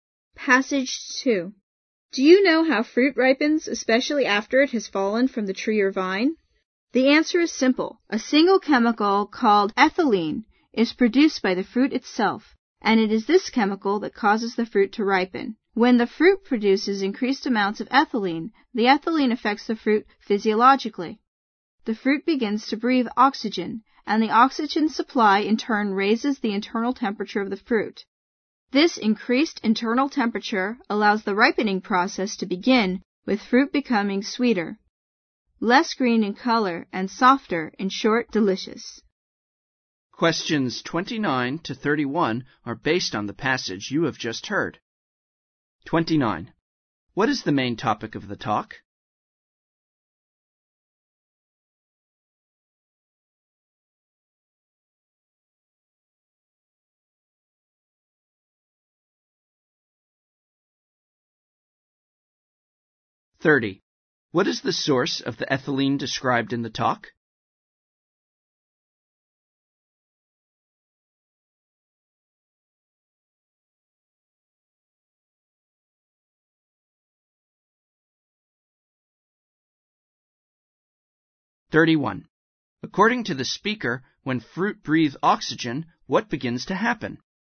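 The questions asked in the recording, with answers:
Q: What is the main topic of the talk?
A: How fruit ripens

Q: What is the source of the ethylene described in the talk?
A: The fruit itself

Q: According to the speaker, when fruit breathes oxygen, what begins to happen?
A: Its internal temperature rises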